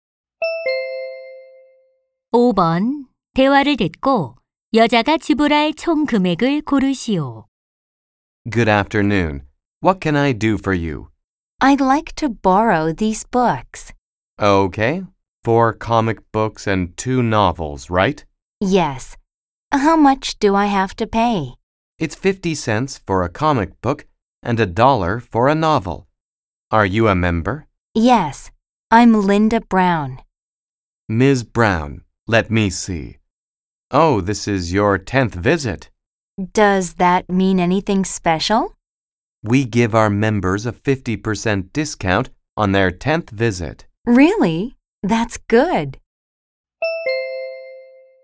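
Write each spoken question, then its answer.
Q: 대화를 듣고 여자가 지불할 총 금액을 고르시오.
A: 2달러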